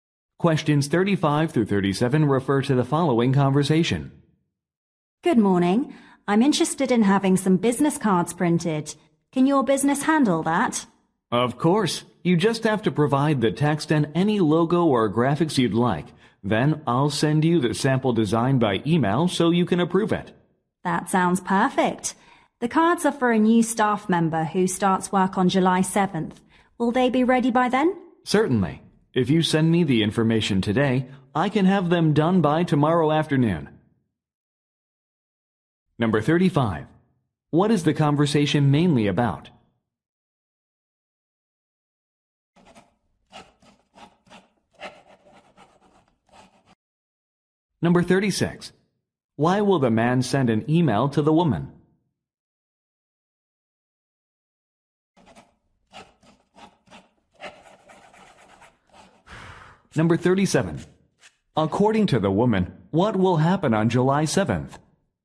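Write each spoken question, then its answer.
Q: What is the conversation mainly about?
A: Printing business cards

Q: Why will the man send an email to the woman?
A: To send a sample design for approval

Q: According to the woman, what will happen on July 7th?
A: A new staff member will start work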